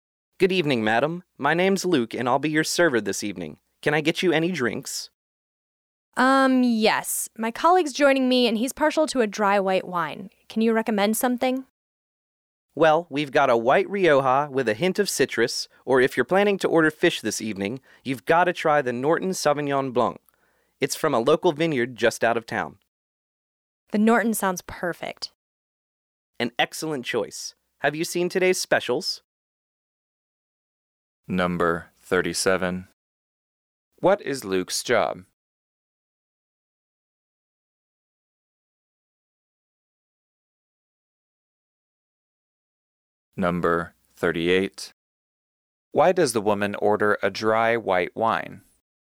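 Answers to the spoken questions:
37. A server (waiter) at a restaurant
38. Her colleague, who is joining her, likes dry white wine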